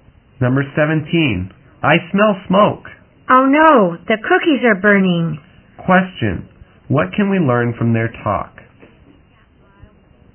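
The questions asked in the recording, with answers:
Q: Question, what can we learn from their talk?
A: The cookies are burning.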